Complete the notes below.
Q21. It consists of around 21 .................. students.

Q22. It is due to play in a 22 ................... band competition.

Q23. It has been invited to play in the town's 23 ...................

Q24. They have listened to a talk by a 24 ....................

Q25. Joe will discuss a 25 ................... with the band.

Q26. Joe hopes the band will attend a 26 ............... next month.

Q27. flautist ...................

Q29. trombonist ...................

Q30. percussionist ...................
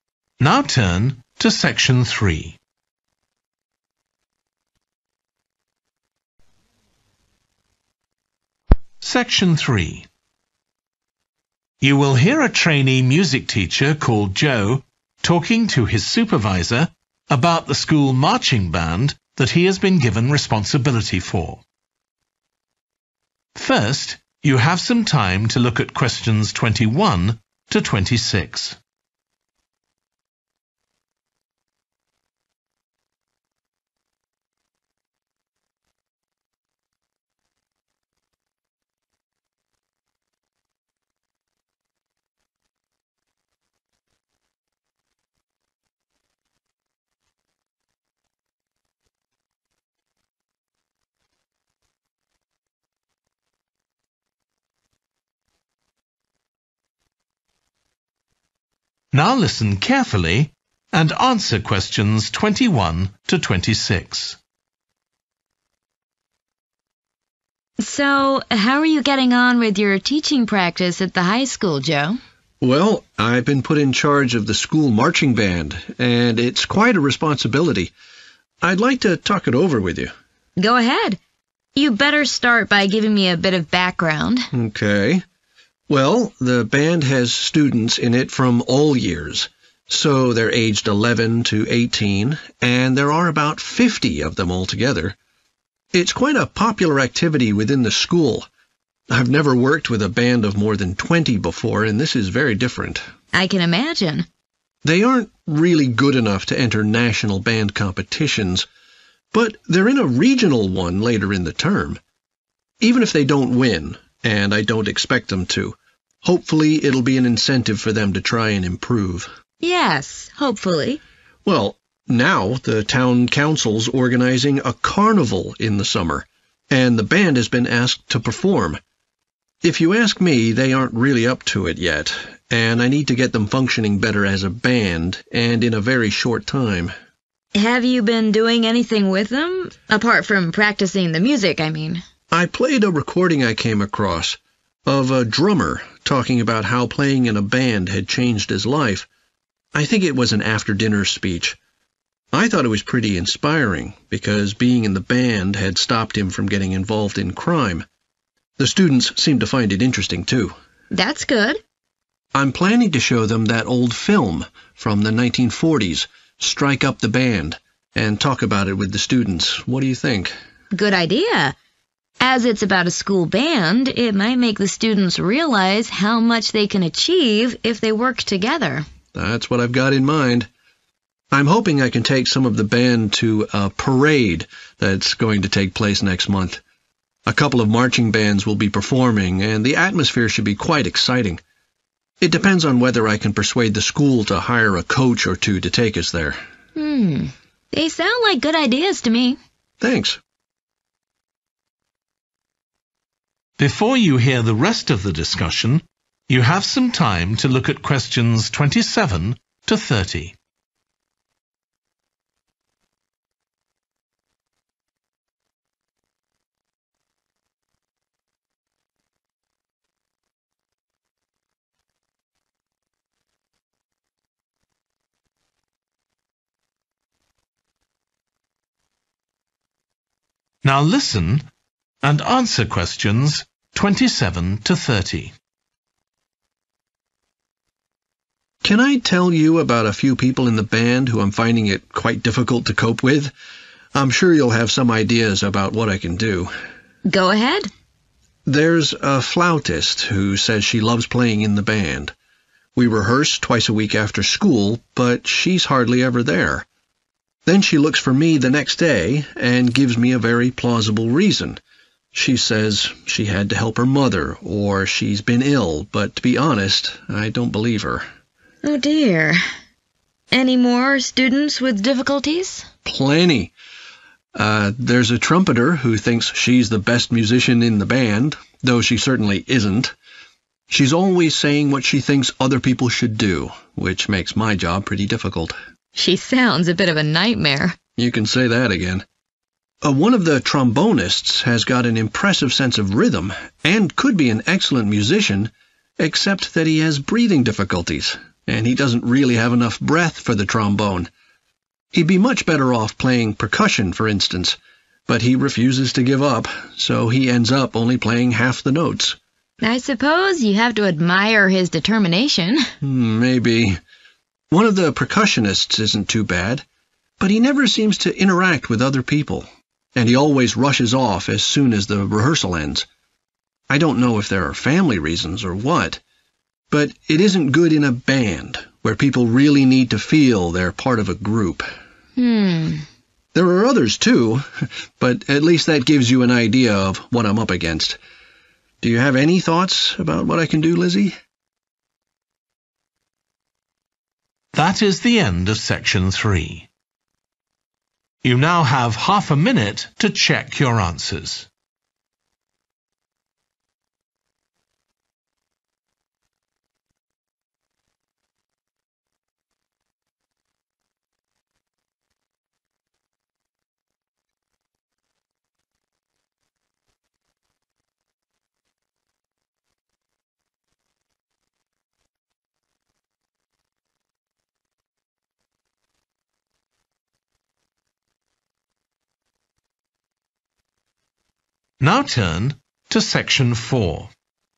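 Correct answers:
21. 50
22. regional
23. carnival
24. drummer
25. film
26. parade
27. gives false excuses for missing rehearsals
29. has a physical difficulty with breathing
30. doesn't mix with other band members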